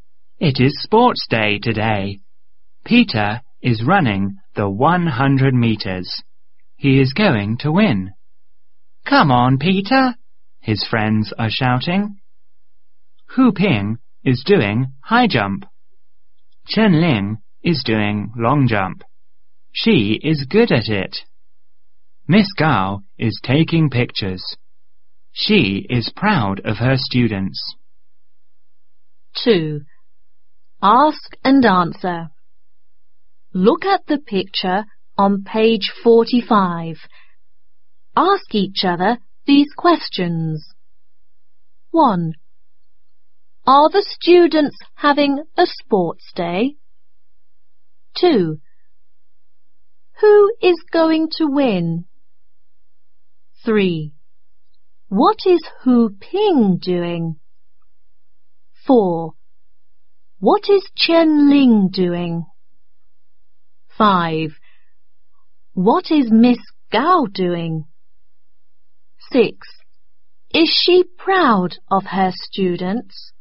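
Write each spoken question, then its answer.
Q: Are the students having a sports day?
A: Yes, they are.

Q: Who is going to win?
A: Peter

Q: What is Hu Ping doing?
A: He is doing high jump.

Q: What is Chen Ling doing?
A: She is doing long jump.

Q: What is Miss Gao doing?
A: She is taking pictures.

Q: Is she proud of her students?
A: Yes, she is.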